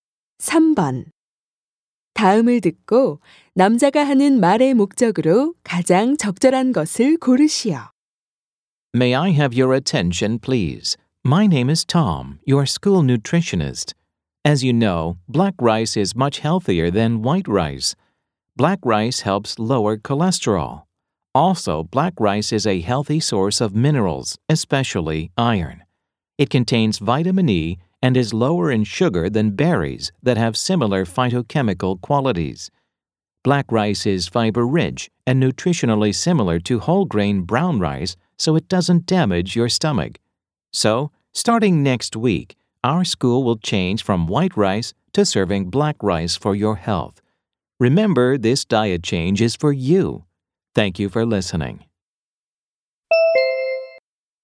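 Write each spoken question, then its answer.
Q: 다음을 듣고 남자가 하는 말의 목적으로 가장 적절한 것을 고르시오.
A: 학교 급식을 흰쌀밥에서 흑미밥으로 바꾼다는 것을 알리려고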